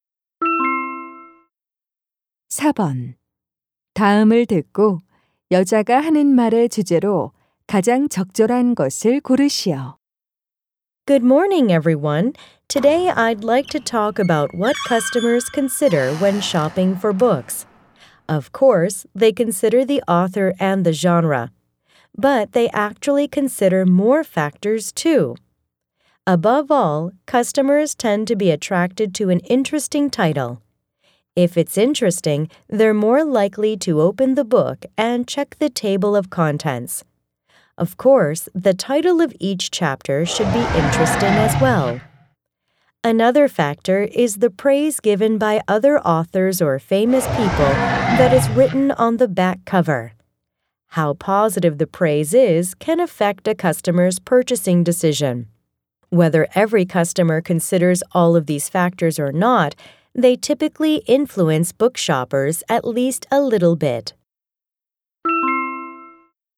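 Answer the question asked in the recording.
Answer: 고객이 책을 살 때 고려하는 요소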